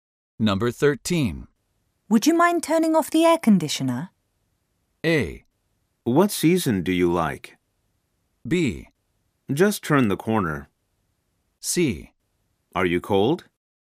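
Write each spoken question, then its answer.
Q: Would you mind turning off the air conditioner?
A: C: Are you cold?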